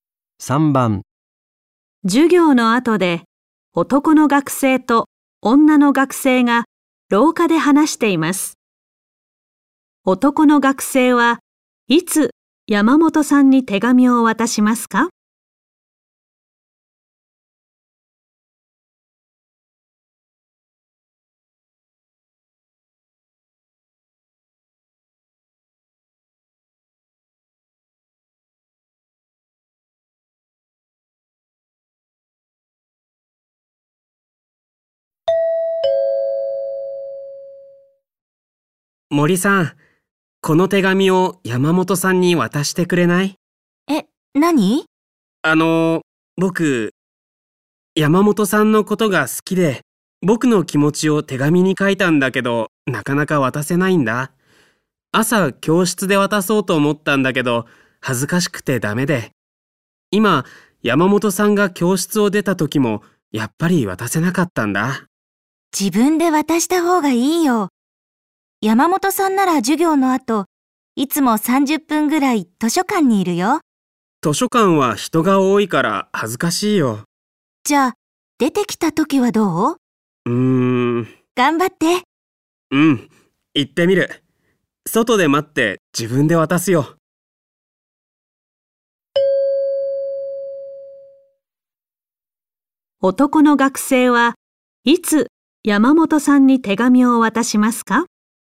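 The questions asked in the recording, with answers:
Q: 男の学生はいつ山本さんに手紙を渡しますか?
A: 山本さんが授業の後、図書館から出てきた時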